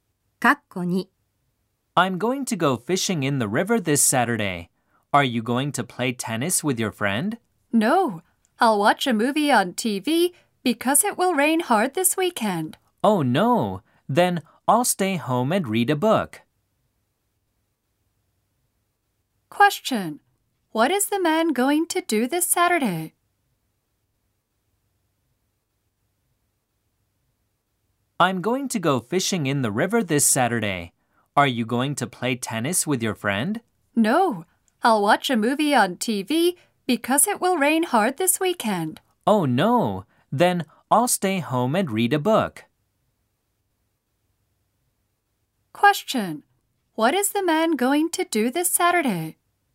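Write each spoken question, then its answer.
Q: What is the man going to do this Saturday?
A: He will stay home and read a book.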